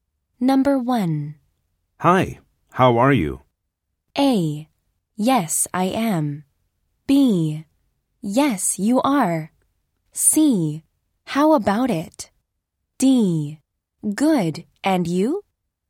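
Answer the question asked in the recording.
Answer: D: Good, and you?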